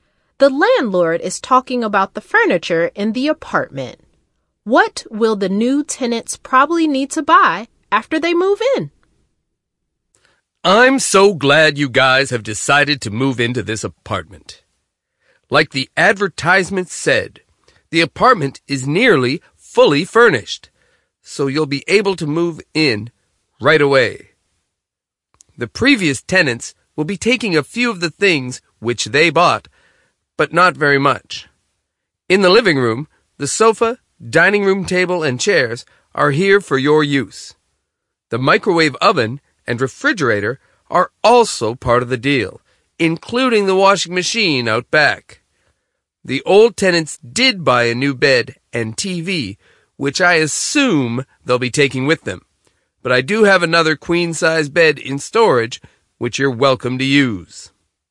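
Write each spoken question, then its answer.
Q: What will the new tenants probably need to buy after they move in?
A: A TV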